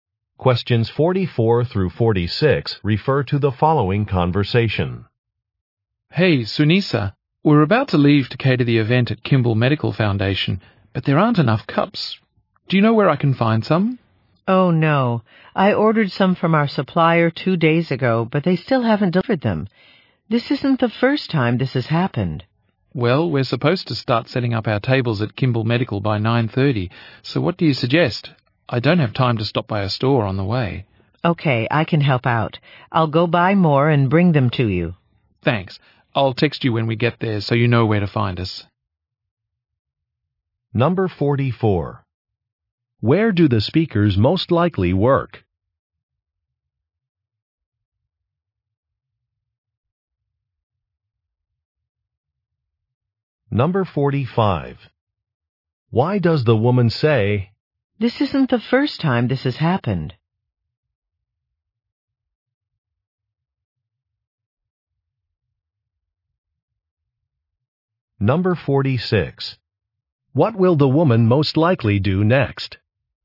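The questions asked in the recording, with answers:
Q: Where do the speakers most likely work?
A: At a catering company

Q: What will the woman most likely do next?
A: Go buy more cups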